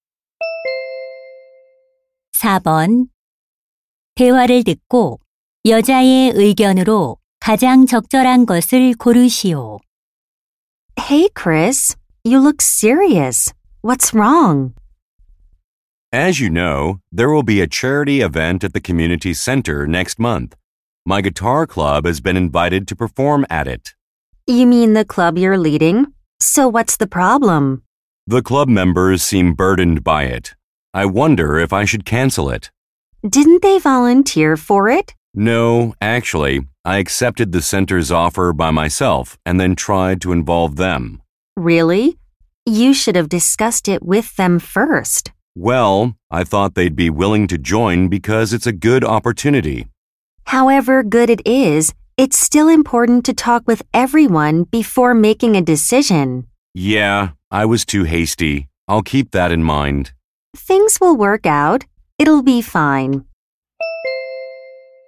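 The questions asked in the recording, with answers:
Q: 대화를 듣고 여자의 의견으로 가장 적절한 것을 고르시오.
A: 결정하기 전에 구성원들과 먼저 상의해야 한다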